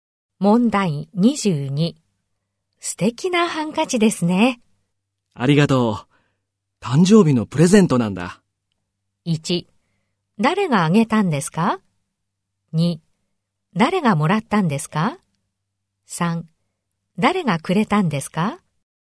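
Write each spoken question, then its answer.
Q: 素敵なハンカチですね。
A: 3: 誰がくれたんですか?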